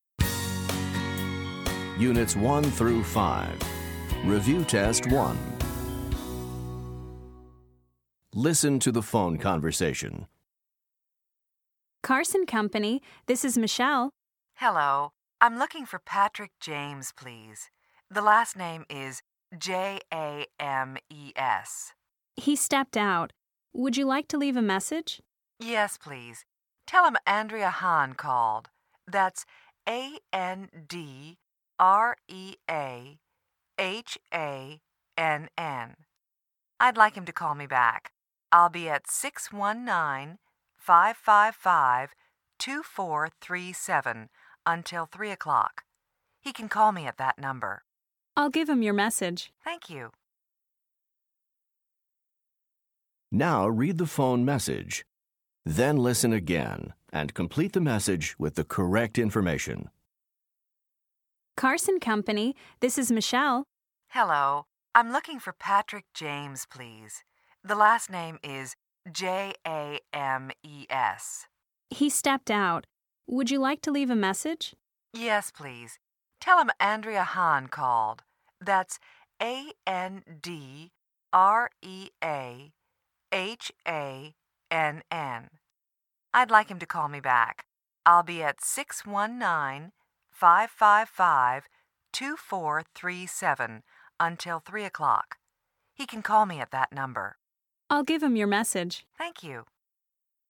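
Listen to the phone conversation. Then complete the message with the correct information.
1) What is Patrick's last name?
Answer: James

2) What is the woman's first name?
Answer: Andrea

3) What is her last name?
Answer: Hahn

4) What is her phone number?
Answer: 619-555-2437

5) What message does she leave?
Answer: Please call her back.

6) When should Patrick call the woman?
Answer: Before 3 o'clock

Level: Top Notch 2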